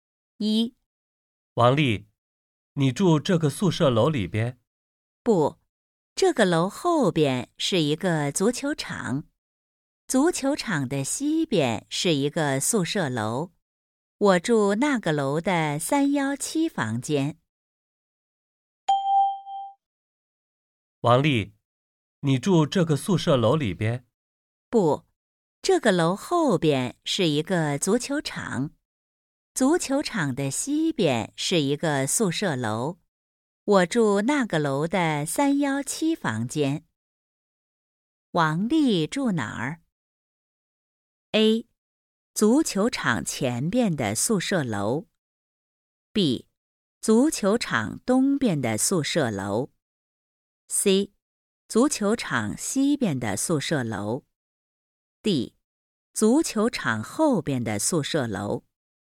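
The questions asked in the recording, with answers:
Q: 王丽住哪儿?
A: C: 足球场西边的宿舍楼。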